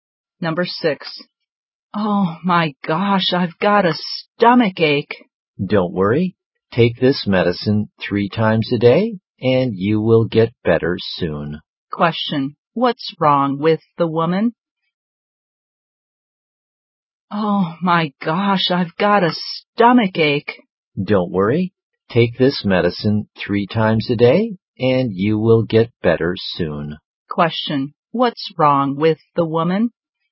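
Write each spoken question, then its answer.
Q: What's wrong with the woman?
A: She has a stomach ache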